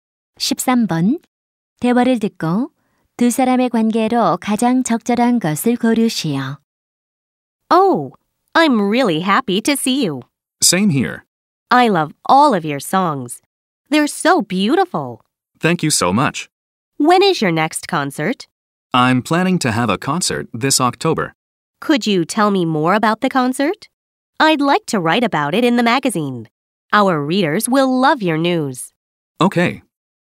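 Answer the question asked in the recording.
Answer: 가수와 잡지 기자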